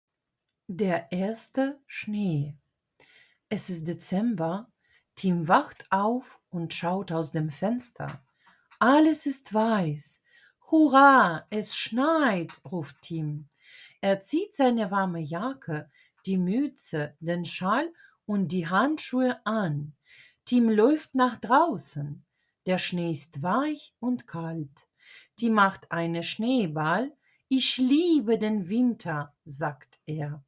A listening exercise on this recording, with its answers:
1. Wortschatzübung: Ergänze die Wörter:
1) Die __ ist weiß.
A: Schnee

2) Tim trägt einen __.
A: Schal

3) Der Schnee ist __.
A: kalt

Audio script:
Kapitel 1: Der erste Schnee
Es ist Dezember. Tim wacht auf und schaut aus dem Fenster. Alles ist weiß! „Hurra, es schneit!", ruft Tim. Er zieht seine warme Jacke, die Mütze, den Schal und die Handschuhe an. Tim läuft nach draußen. Der Schnee ist weich und kalt. Tim macht einen Schneeball. „Ich liebe den Winter!", sagt er.